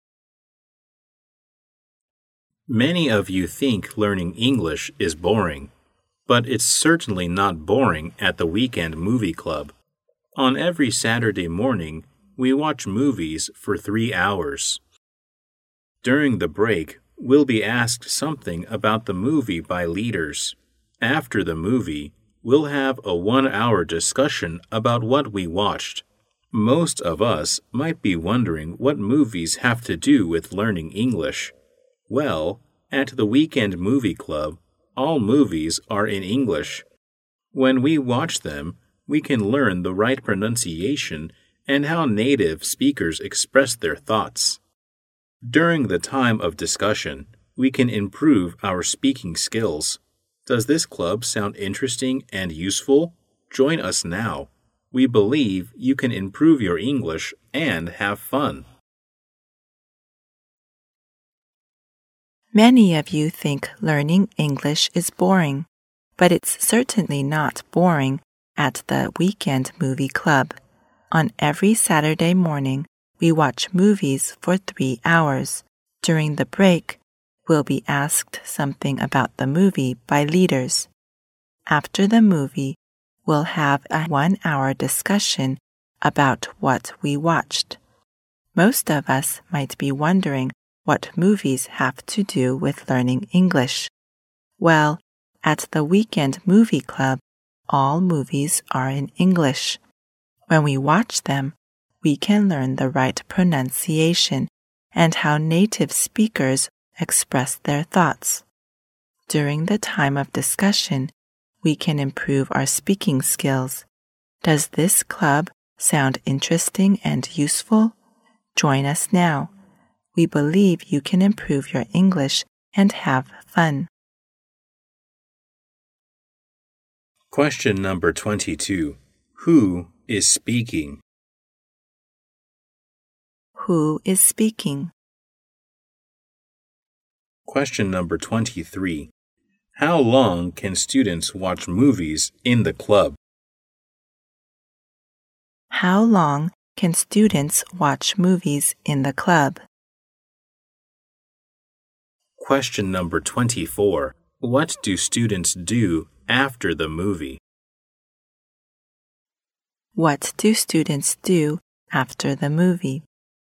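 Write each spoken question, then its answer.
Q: How long can students watch movies in the club?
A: 3 hours

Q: What do students do after the movie?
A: Have a one-hour discussion about the movie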